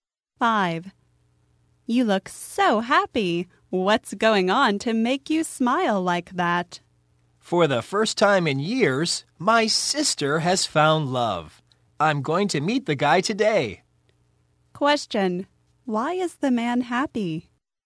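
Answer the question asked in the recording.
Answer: His sister has found love for the first time in years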